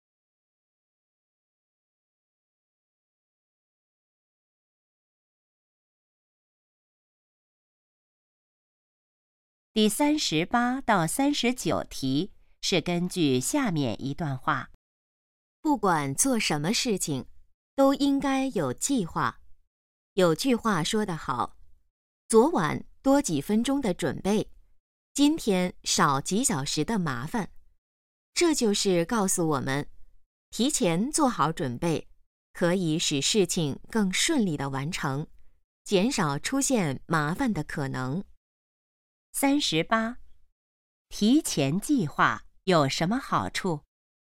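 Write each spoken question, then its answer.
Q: 提前计划有什么好处?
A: 使事情更顺利地完成

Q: 这段话主要想告诉我们什么?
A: 做事要有计划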